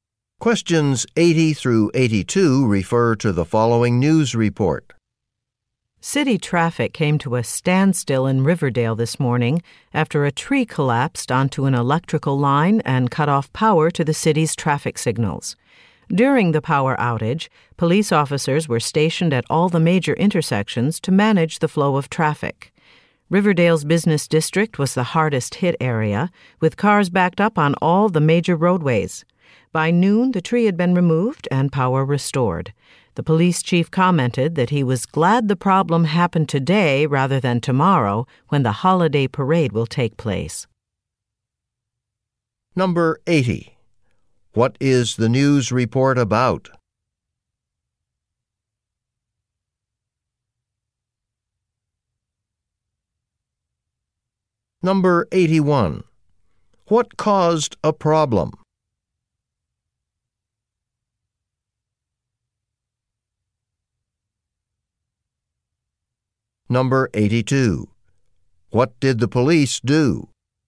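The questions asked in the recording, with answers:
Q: What is the news report about?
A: A traffic standstill caused by a power outage to the traffic signals

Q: What caused a problem?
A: A tree fell onto an electrical line

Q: What did the police do?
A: They managed traffic at the major intersections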